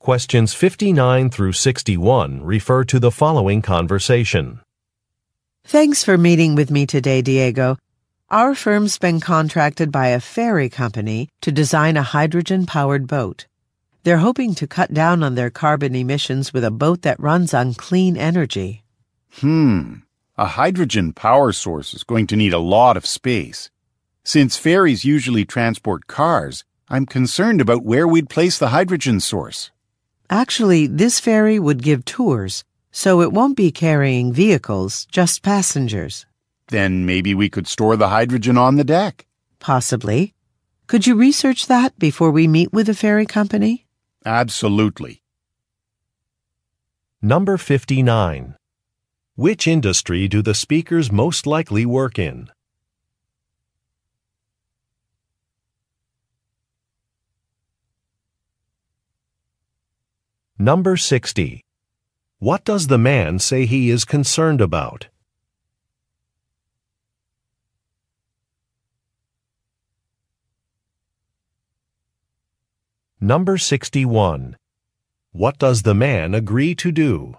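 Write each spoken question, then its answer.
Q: What does the man say he is concerned about?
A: Where to place the hydrogen power source

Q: What does the man agree to do?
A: Research storing the hydrogen on the deck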